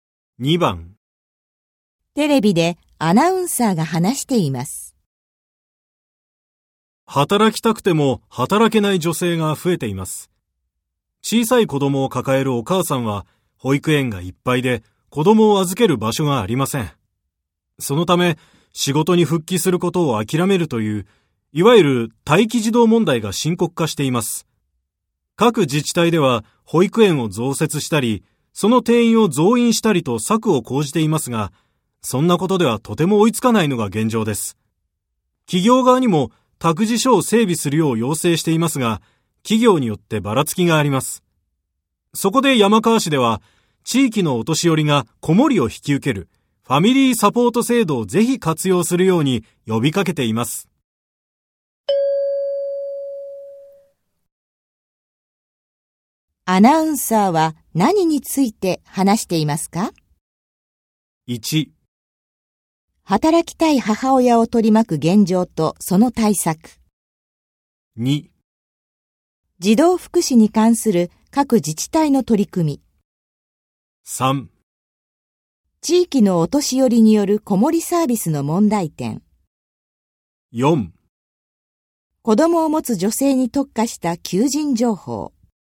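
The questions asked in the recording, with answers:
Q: アナウンサーは何について話していますか?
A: 1: 働きたい母親を取り巻く現状とその対策。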